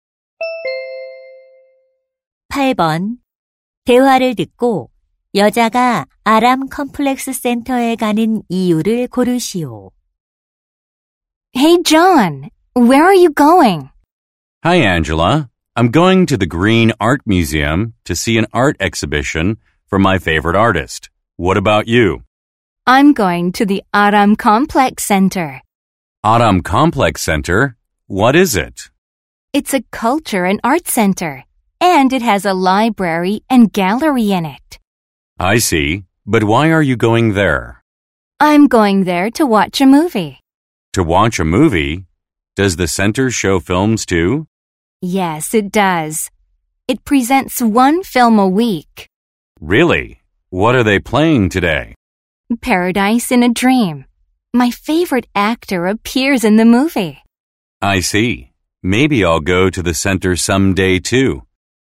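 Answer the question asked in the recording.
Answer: 영화를 보려고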